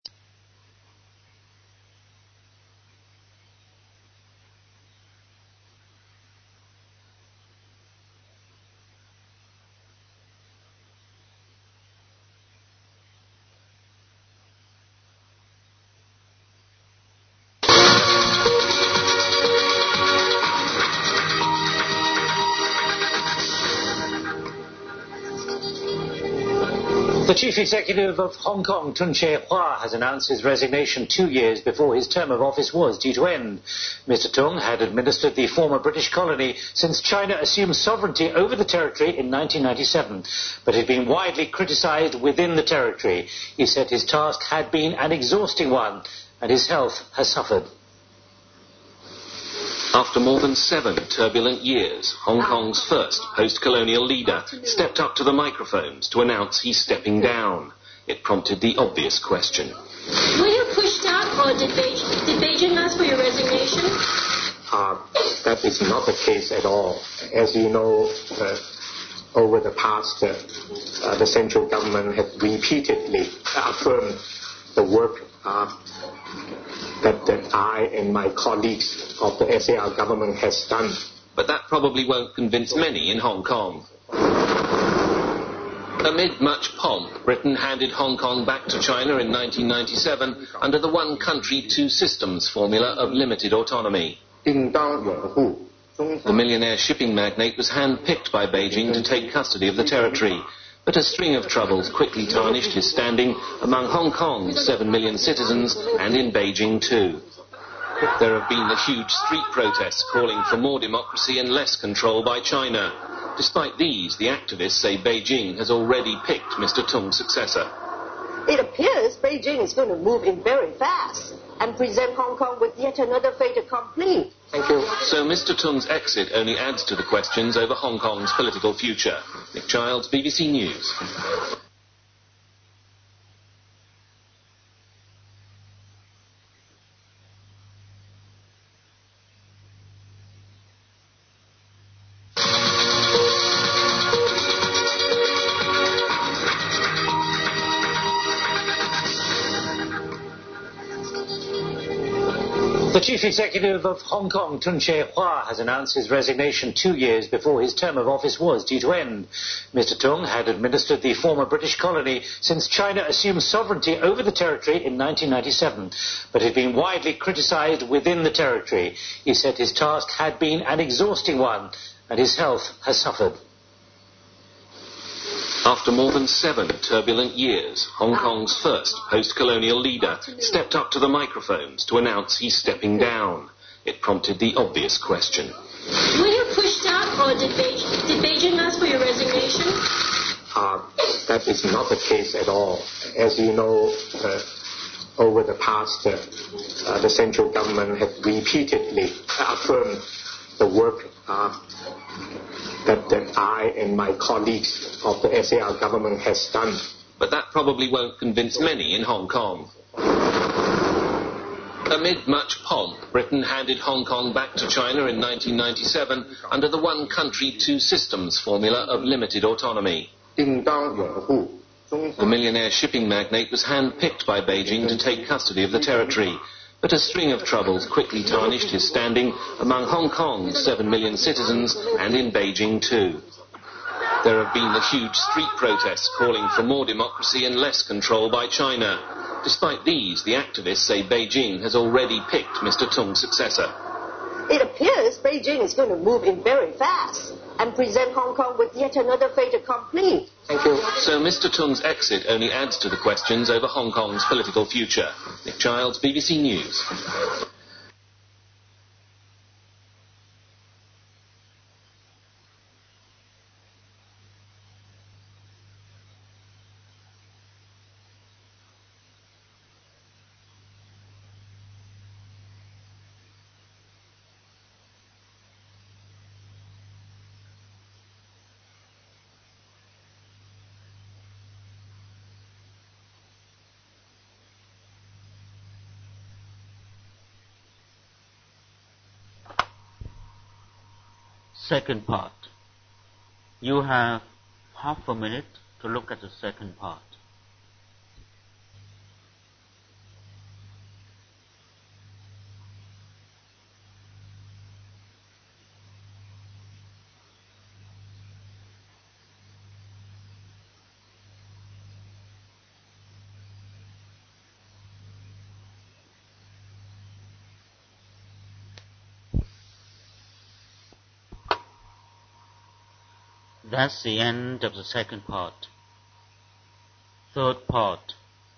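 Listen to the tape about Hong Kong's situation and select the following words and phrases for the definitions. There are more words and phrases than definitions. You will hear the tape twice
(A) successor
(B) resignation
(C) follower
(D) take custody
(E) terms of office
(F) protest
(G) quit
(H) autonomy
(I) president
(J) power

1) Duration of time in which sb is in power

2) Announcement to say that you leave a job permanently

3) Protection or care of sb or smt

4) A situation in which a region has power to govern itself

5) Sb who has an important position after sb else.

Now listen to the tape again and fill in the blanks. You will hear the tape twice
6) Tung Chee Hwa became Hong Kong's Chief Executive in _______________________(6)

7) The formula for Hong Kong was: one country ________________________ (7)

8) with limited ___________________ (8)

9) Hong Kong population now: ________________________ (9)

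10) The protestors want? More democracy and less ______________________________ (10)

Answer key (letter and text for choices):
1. (E) terms of office
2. (B) resignation
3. (D) take custody
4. (H) autonomy
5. (A) successor
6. 1997
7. two systems
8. autonomy
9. 7 million
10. control by China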